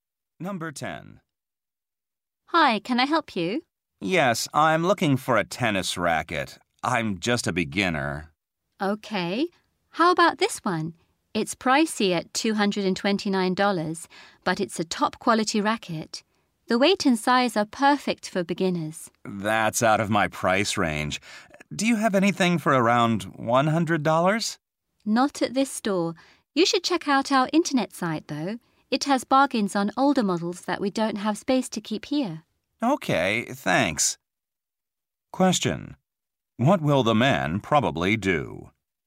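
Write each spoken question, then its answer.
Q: What will the man probably do?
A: Look for a cheaper older model on the store's website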